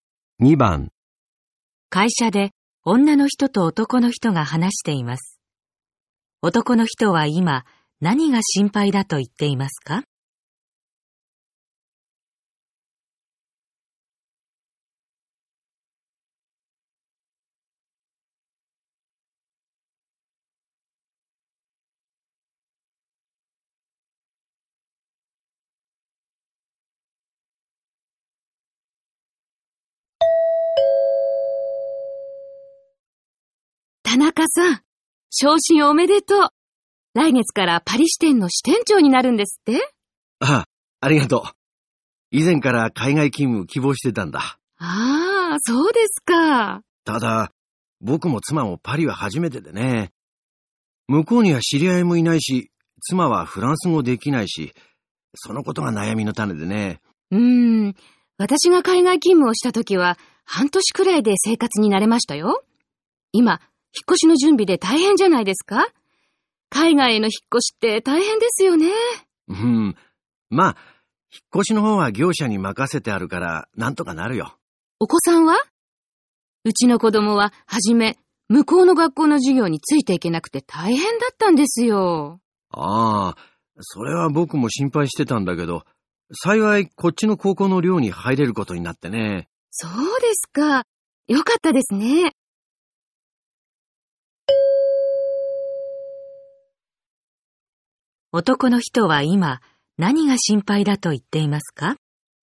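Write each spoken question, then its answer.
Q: 男の人は今何が心配だと言っていますか?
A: 知り合いがいないことと、妻がフランス語ができないこと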